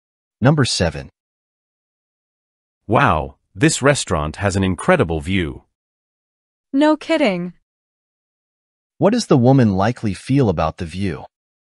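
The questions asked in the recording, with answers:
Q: What does the woman likely feel about the view?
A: She agrees that the view is amazing.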